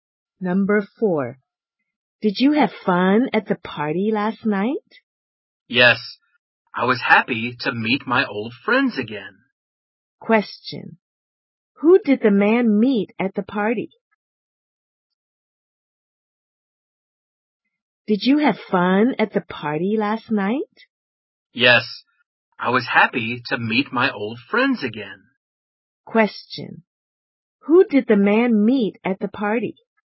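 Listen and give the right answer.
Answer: His old friends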